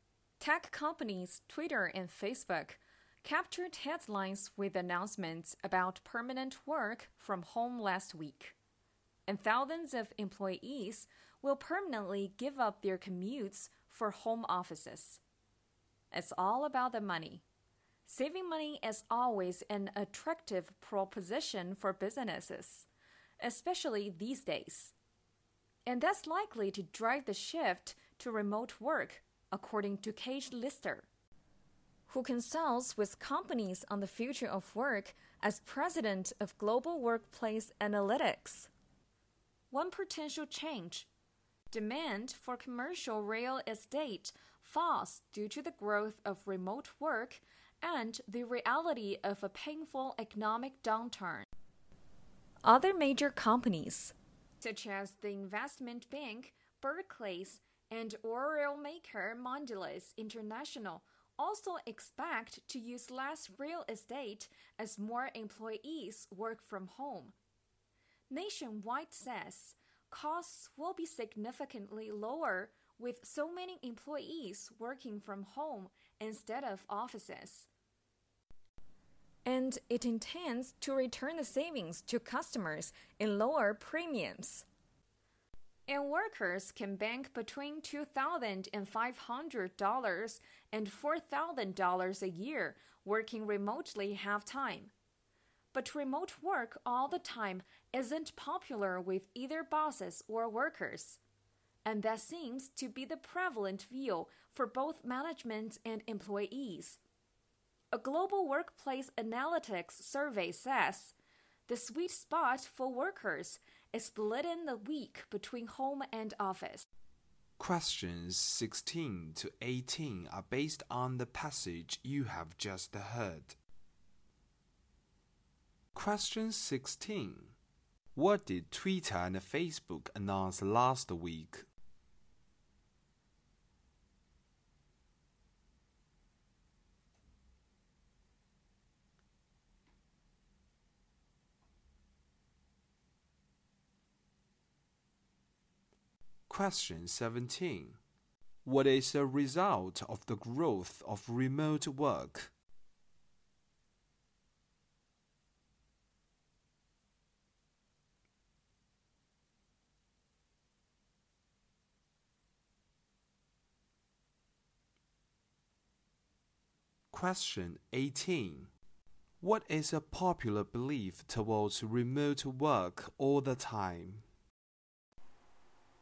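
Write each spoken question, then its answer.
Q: What did Twitter and Facebook announce last week?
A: Permanent work from home.

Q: What is the result of the growth of remote work?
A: Demand for commercial real estate falls.

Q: What is a popular belief towards remote work all the time?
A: It isn't popular with either bosses or workers.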